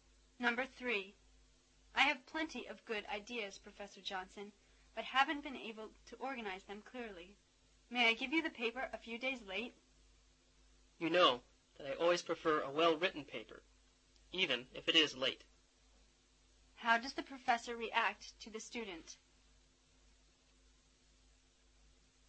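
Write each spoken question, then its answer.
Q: How does the professor react to the student?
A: He agrees to accept the paper late.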